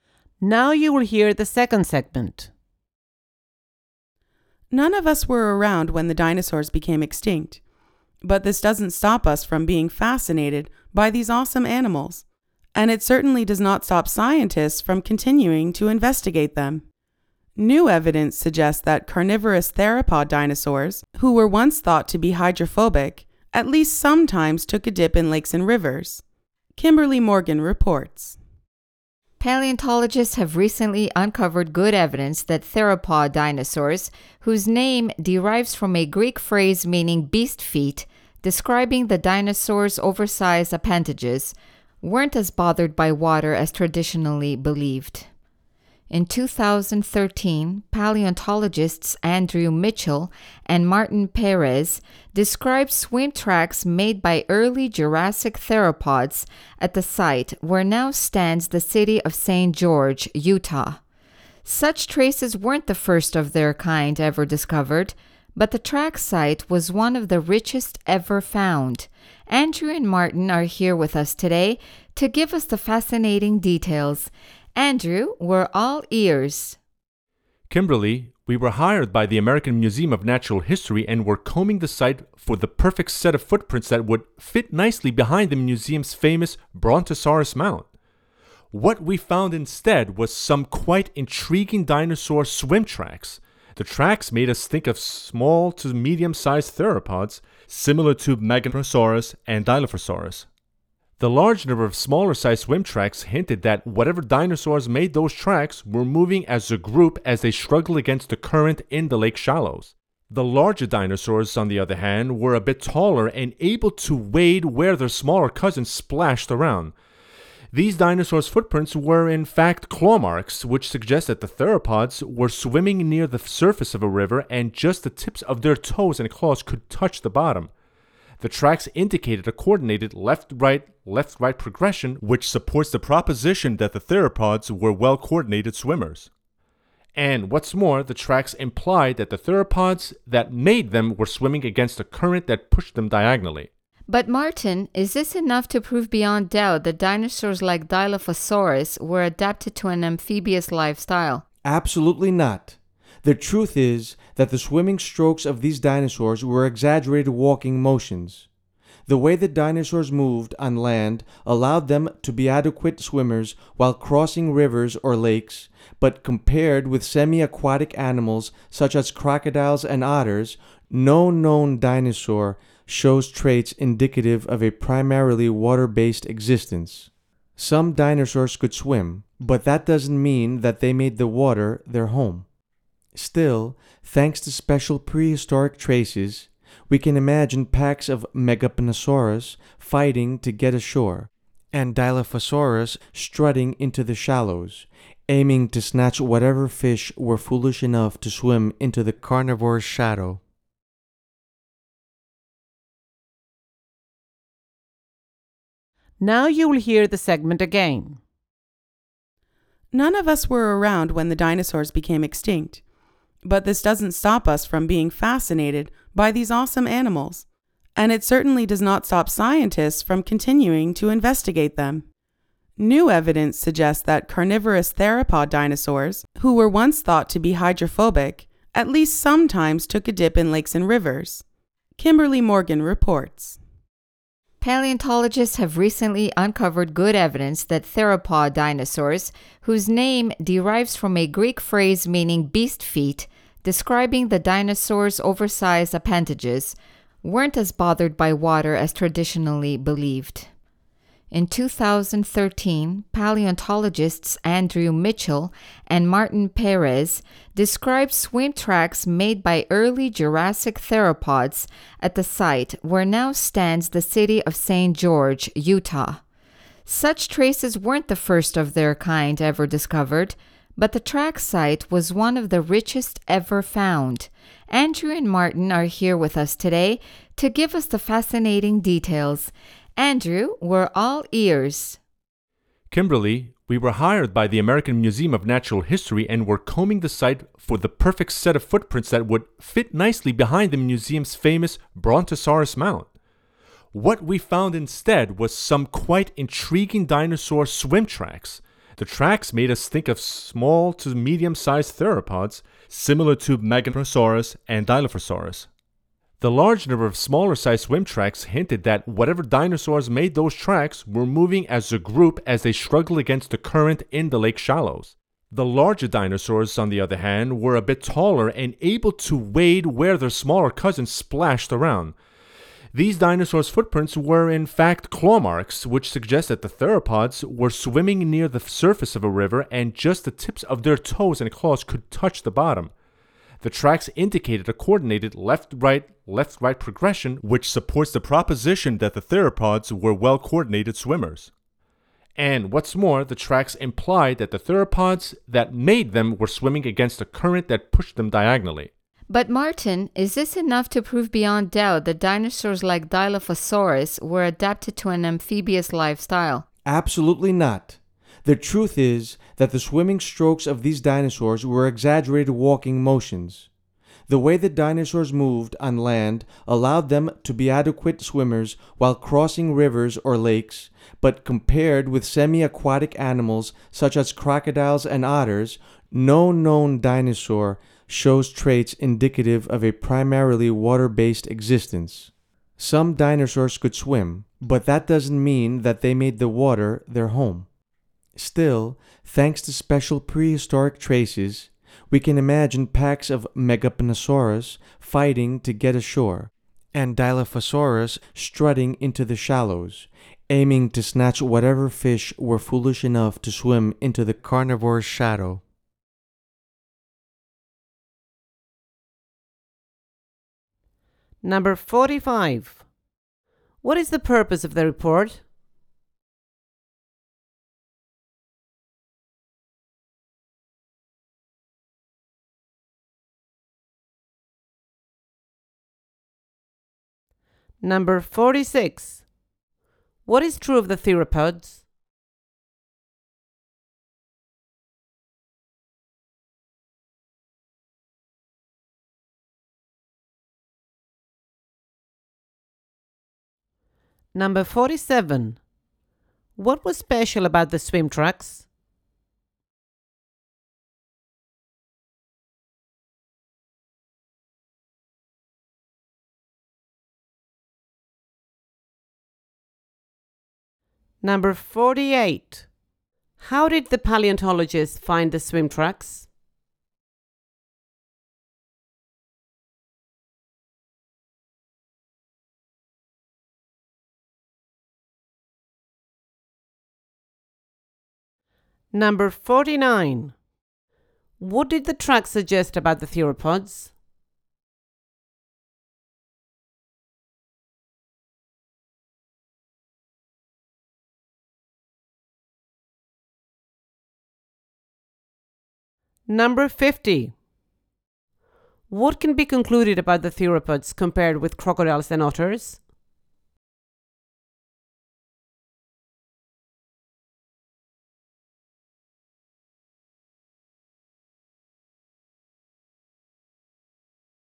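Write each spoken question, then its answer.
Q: What is the purpose of the report?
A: To present new evidence that theropod dinosaurs sometimes swam

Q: How did the paleontologists find the swim tracks?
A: By chance, while searching for footprints to display behind the museum's Brontosaurus mount

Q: What can be concluded about the theropods compared with crocodiles and otters?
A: They were not adapted to living mainly in water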